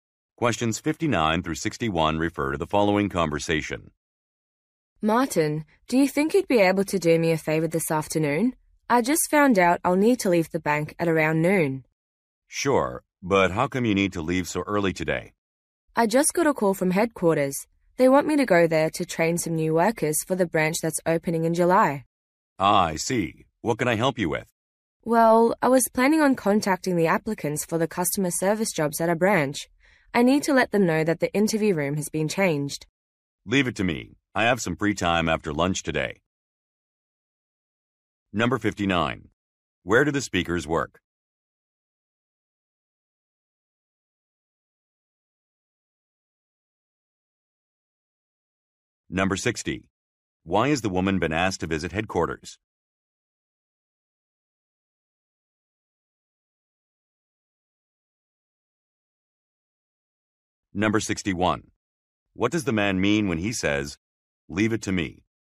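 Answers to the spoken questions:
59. At a bank
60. To train new workers
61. He will contact the applicants about the room change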